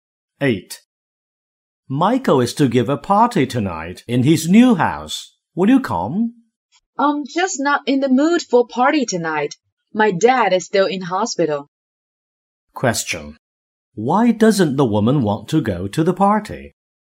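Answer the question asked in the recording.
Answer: Her dad is still in hospital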